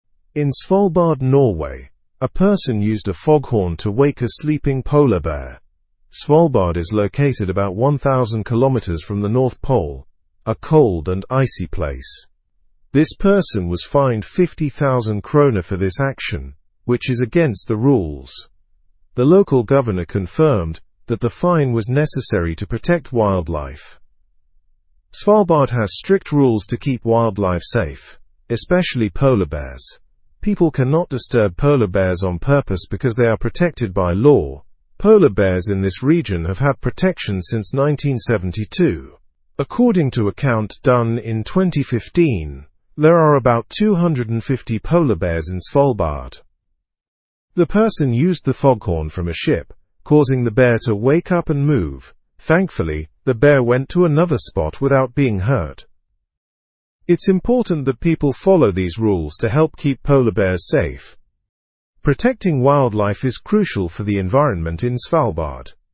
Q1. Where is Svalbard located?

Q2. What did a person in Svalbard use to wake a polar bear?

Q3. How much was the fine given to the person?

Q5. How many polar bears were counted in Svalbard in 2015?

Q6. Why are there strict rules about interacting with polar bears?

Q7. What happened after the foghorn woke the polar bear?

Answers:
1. Svalbard is about 1,000 kilometers from the North Pole.
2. The person used a foghorn.
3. The fine was 50,000 kroner.
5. About 250 polar bears were counted.
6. To protect the polar bears and keep them safe.
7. The polar bear moved away to another spot.

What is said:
In Svalbard, Norway, a person used a foghorn to wake a sleeping polar bear. Svalbard is located about 1,000 kilometers from the North Pole, a cold and icy place. This person was fined 50,000 kroner for this action, which is against the rules. The local governor confirmed that the fine was necessary to protect wildlife.
Svalbard has strict rules to keep wildlife safe, especially polar bears. People cannot disturb polar bears on purpose because they are protected by law. Polar bears in this region have had protection since 1972. According to a count done in 2015, there are about 250 polar bears in Svalbard.
The person used the foghorn from a ship, causing the bear to wake up and move. Thankfully, the bear went to another spot without being hurt. It's important that people follow these rules to help keep polar bears safe. Protecting wildlife is crucial for the environment in Svalbard.

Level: Level 2